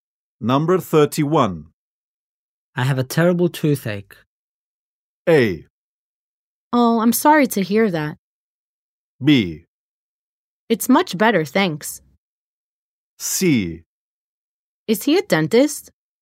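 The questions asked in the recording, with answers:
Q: I have a terrible toothache.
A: A: Oh, I'm sorry to hear that.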